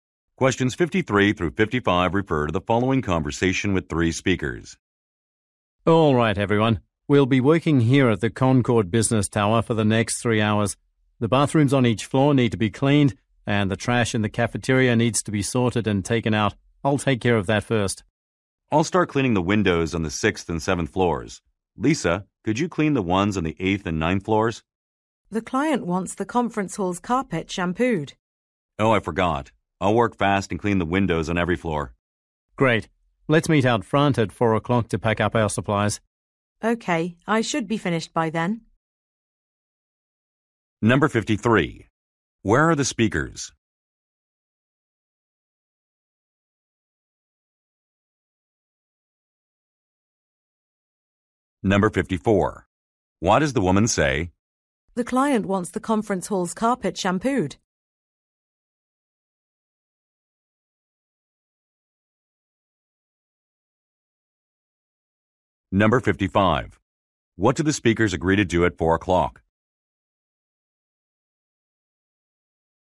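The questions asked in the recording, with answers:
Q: Where are the speakers?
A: At the Concord Business Tower.

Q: What do the speakers agree to do at 4 o'clock?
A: Meet out front to pack up supplies.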